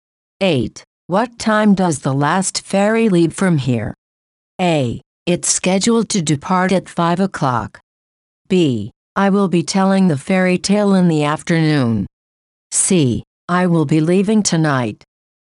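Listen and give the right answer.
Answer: A: It's scheduled to depart at 5 o'clock.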